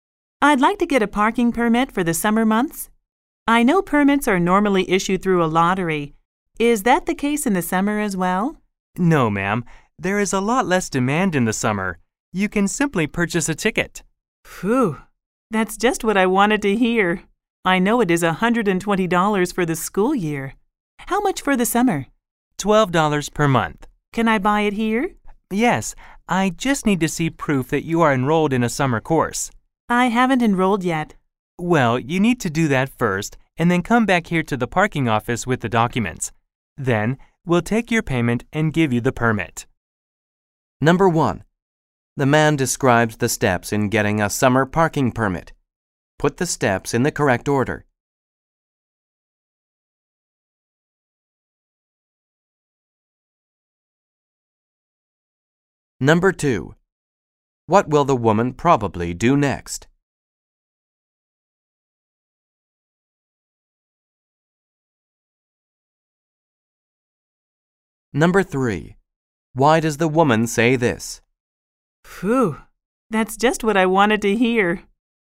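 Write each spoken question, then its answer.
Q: What will the woman probably do next?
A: Enroll in a summer course

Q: Why does the woman say this?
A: She is relieved she doesn't have to go through the lottery to get a permit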